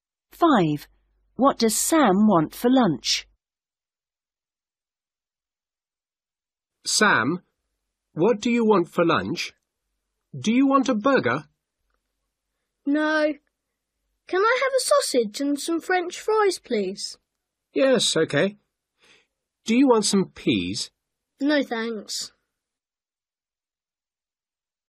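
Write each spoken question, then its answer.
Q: What does Sam want for lunch?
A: a sausage and some French fries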